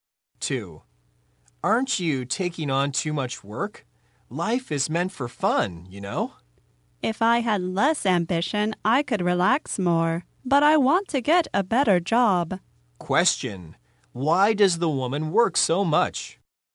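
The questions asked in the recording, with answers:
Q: Why does the woman work so much?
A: She wants to get a better job.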